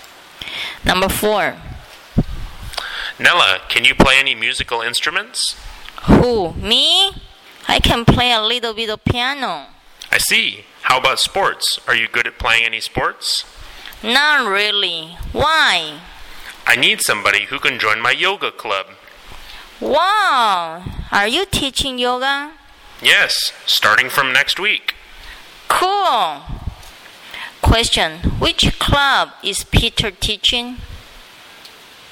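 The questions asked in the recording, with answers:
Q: Question, which club is Peter teaching?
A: Yoga club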